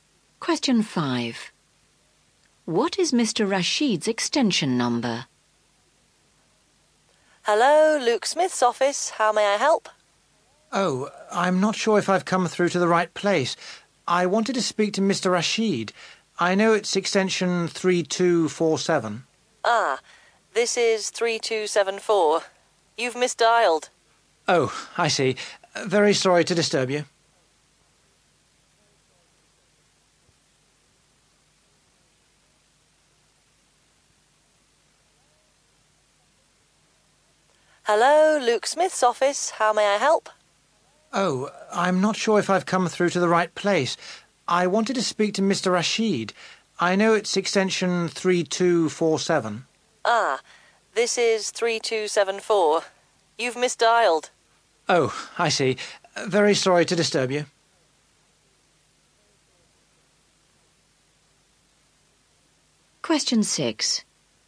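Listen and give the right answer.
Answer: 3247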